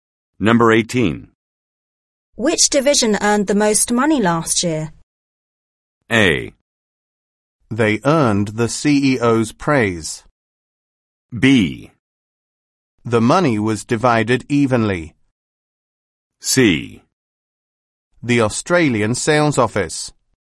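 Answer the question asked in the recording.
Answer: C: The Australian sales office.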